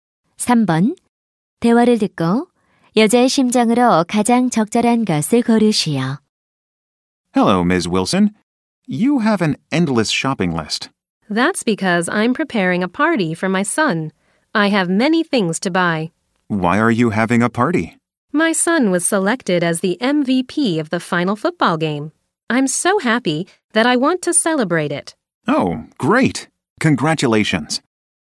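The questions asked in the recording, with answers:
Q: 대화를 듣고 여자의 심정으로 가장 적절한 것을 고르시오.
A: 기쁨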